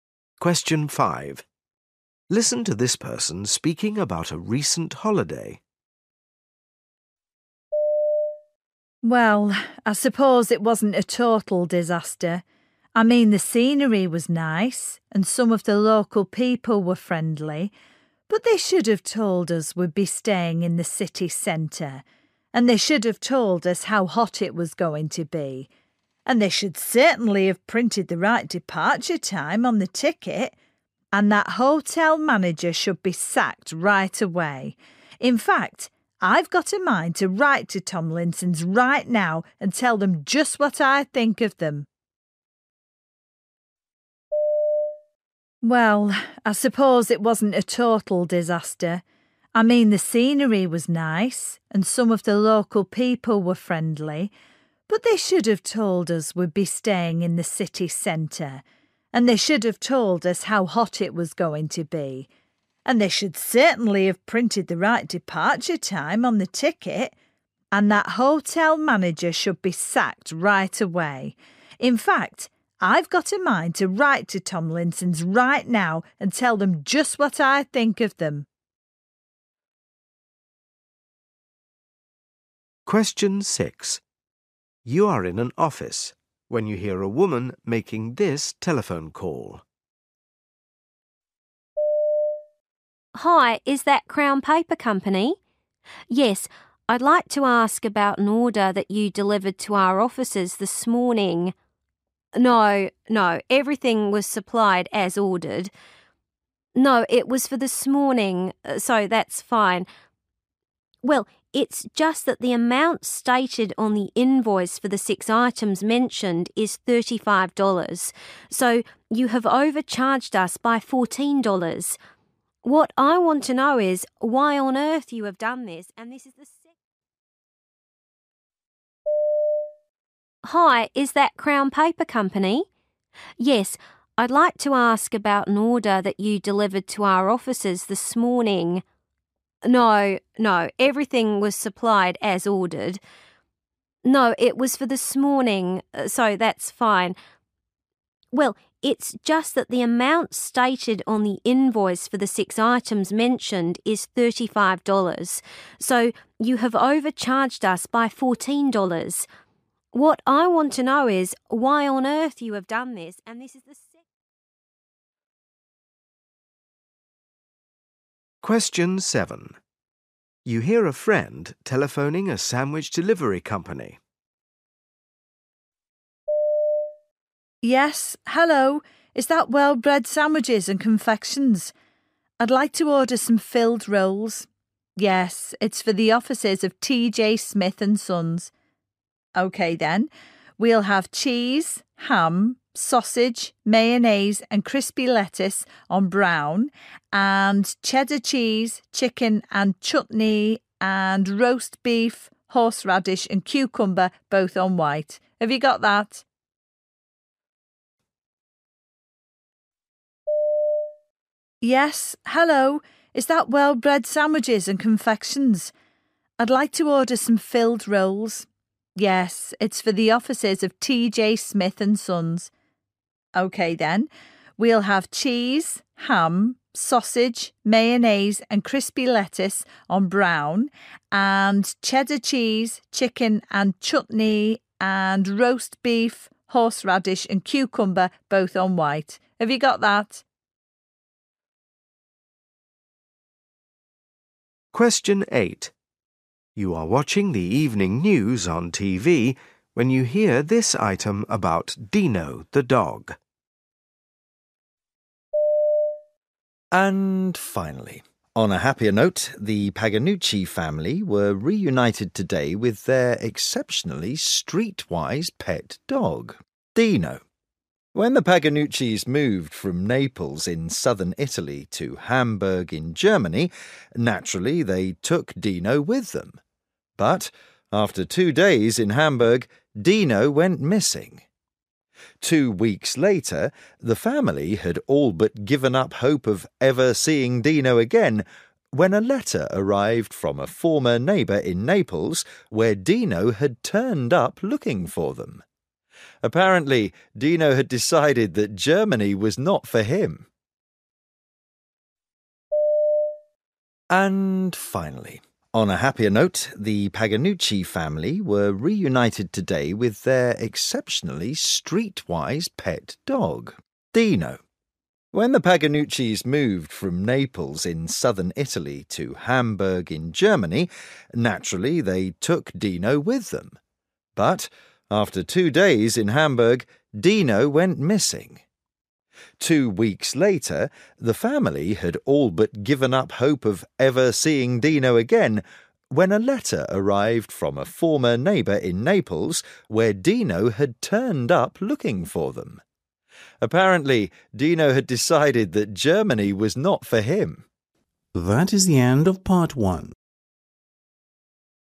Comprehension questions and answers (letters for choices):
You will hear people talking in eight different situations. For questions 1-8, choose the best answer (A, B or C).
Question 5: What is the speaker complaining about?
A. the holiday company.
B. the country she visited.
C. the whole holiday.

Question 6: The speaker complains about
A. being given the wrong supplies.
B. the lateness of the delivery.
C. having paid too much.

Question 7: What is the speaker ordering?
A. 2 sandwiches.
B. 3 sandwiches.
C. 4 sandwiches.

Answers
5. A
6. C
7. B

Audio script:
And that was when I realised the true enormity of the problem that Samantha will be taking on. You see, ever since we were at school together, George has had the most hideously smelly feet ... and that is why I have bought him one of these ...
5 Listen to this person speaking about a recent holiday.
Well, I suppose it wasn't a total disaster, I mean the scenery was nice and some of the local people were friendly but they should have told us we'd be staying in the city centre ... and they should have told us how hot it was going to be ... and they should certainly have printed the right departure time on the ticket ... and that hotel manager should be sacked right away. In fact, I've got a mind to write to Tomlinson's right now and tell them just what I think of them.
6 You are in an office when you hear a woman making this telephone call.
Hi. Is that Crown Paper Company? Yes, I'd like to ask about an order that you delivered to our offices this morning ... No, no everything was supplied as ordered ... No, it was for this morning, so that's fine ... Well it's just that the amount stated on the invoice for the six items mentioned is $35, so you have overcharged us by $14. What I want to know is why on earth you have done this?
7 You hear a friend telephoning a sandwich delivery company.
Yes, hello, is that 'Well-Bred Sandwiches and Confections'? I'd like to order some filled rolls ... Yes ... it's for the offices of T.J. Smith and Sons ... OK then. We'll have cheese, ham, sausage, mayonnaise and crispy lettuce on brown and cheddar cheese, chicken and chutney, and roast beef, horse radish and cucumber, both on white. Have you got that?
8 You are watching the evening news on TV when you hear this item about Dino the dog.
And finally, on a happier note, the Paganucci family were reunited today with their exceptionally streetwise pet dog, Dino. When the Paganuccis moved from Naples in southern Italy to Hamburg in Germany, naturally, they took Dino with them. But after two days in Hamburg, Dino went missing. Two weeks later, the family had all but given up hope of ever seeing Dino again when a letter arrived from a former neighbour in Naples where Dino had turned up looking for them. Apparently, Dino had decided that Germany was not for him.